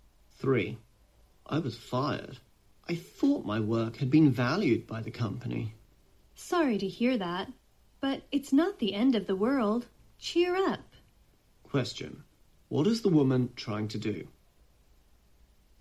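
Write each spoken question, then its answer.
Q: What is the woman trying to do?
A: Comfort the man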